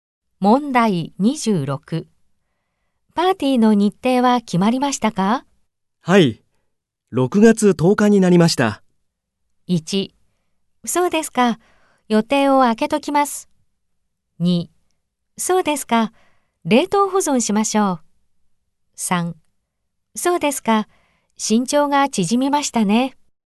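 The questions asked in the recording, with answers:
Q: パーティーの日程は決まりましたか?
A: 1: そうですか。予定を空けときます。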